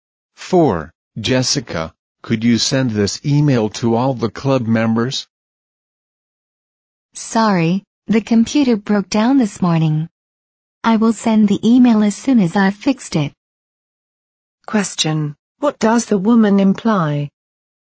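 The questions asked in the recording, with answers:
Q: What does the woman imply?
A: She can't send the email until the computer is fixed.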